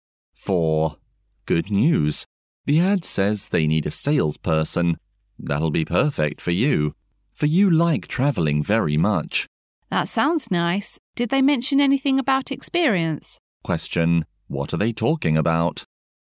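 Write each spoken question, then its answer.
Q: What are they talking about?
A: A salesperson job ad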